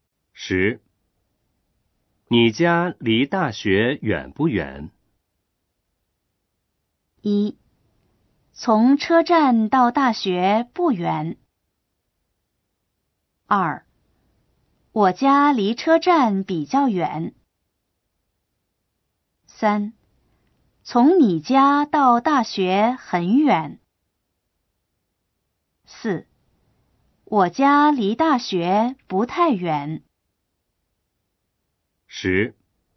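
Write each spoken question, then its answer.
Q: 你家离大学远不远?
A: 4: 我家离大学不太远。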